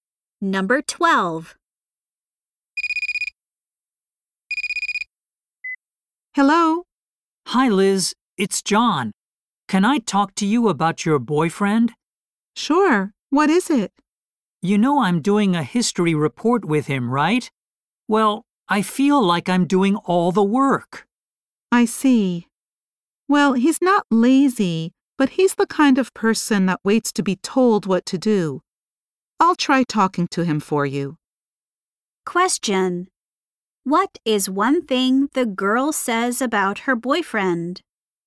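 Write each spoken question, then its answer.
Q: What is one thing the girl says about her boyfriend?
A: He waits to be told what to do.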